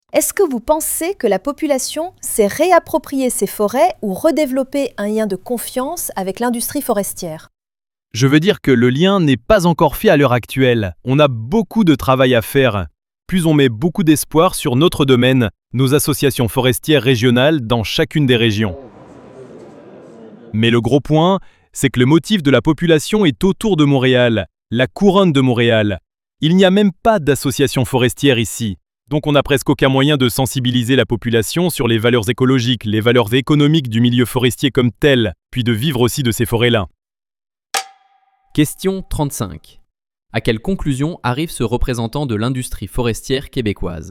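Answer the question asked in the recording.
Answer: Le lien avec la population n'est pas encore rétabli ; il reste beaucoup de travail de sensibilisation à faire.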